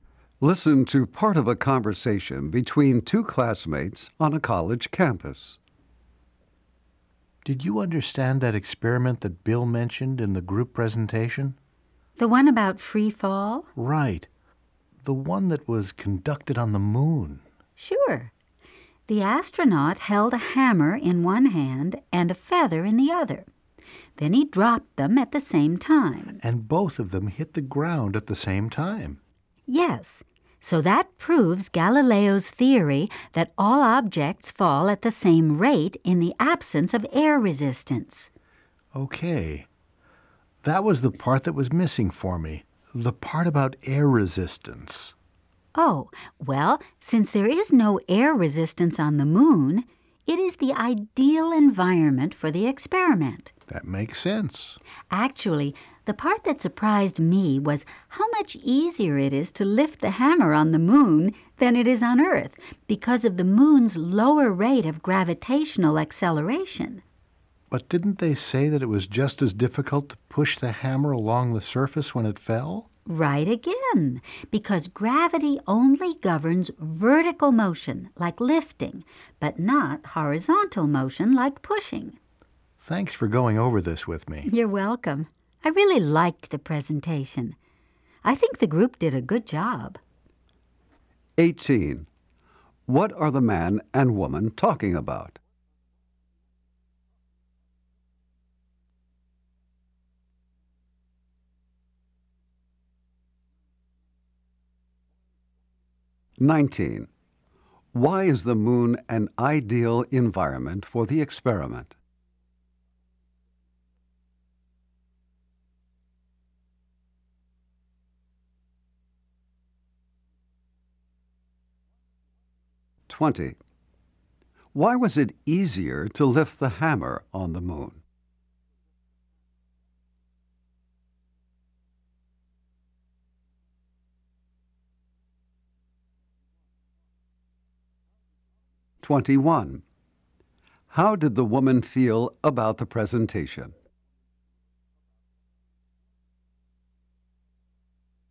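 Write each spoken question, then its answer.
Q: What are the man and woman talking about?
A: The free fall experiment conducted on the moon, from a group presentation

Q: Why is the moon an ideal environment for the experiment?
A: There is no air resistance on the moon

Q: Why was it easier to lift the hammer on the moon?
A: The moon's gravitational acceleration is lower

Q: How did the woman feel about the presentation?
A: She liked it and thought the group did a good job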